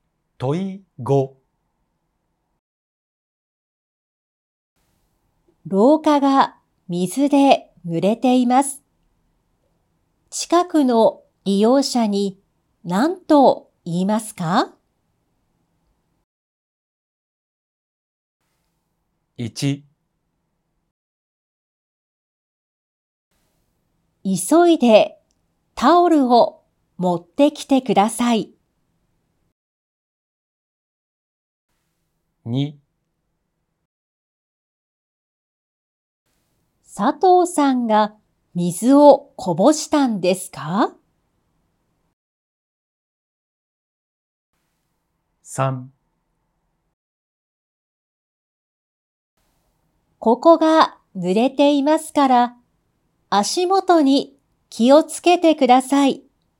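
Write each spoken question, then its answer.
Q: 廊下が水で濡れています。近くの利用者に何と言いますか?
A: 3: ここが濡れていますから、足元に気をつけてください。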